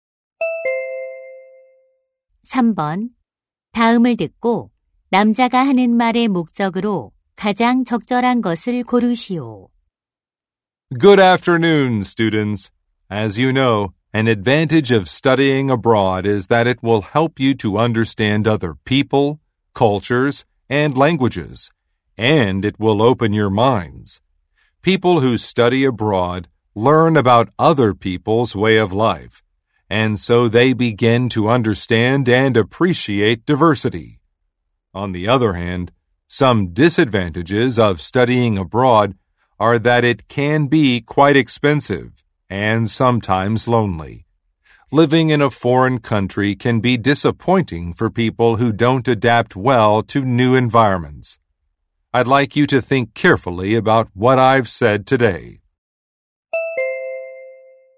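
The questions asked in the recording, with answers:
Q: 다음을 듣고 남자가 하는 말의 목적으로 가장 적절한 것을 고르시오.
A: 유학의 장단점을 신중히 생각해 보도록 당부하려고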